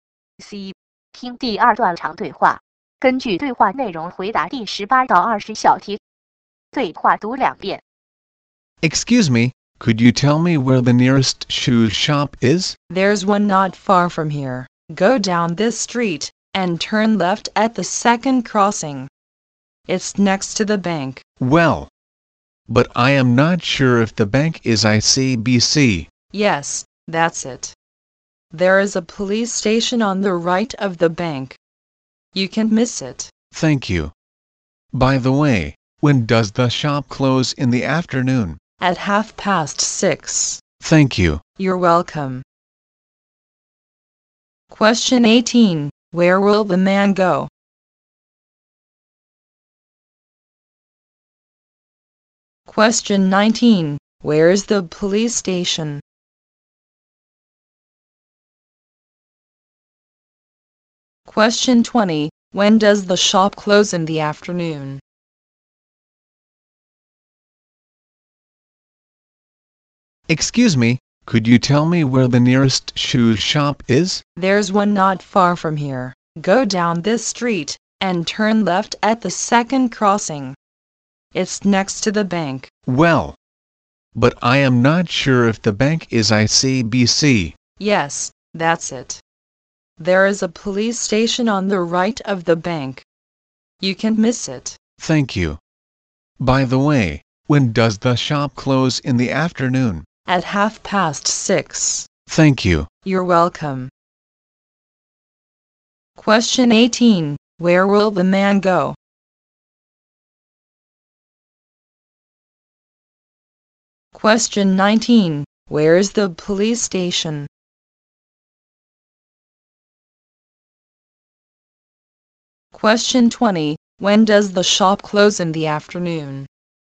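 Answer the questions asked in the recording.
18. To the shoe shop
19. On the right of the bank
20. At 6:30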